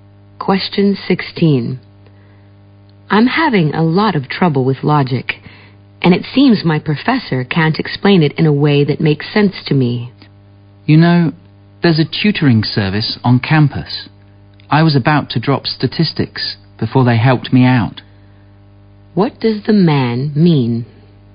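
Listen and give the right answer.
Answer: The woman should go to the campus tutoring service.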